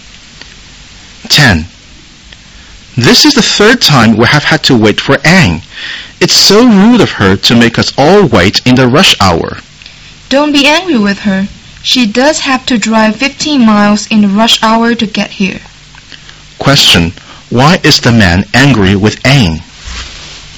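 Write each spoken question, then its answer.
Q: Why is the man angry with Anne?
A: Anne has made them wait for her again (the third time)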